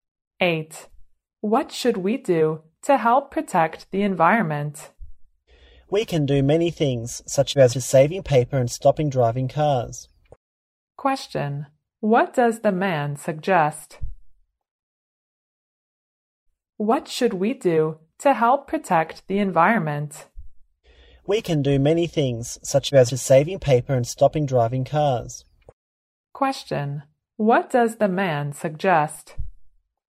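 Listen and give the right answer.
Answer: Saving paper and stopping driving cars.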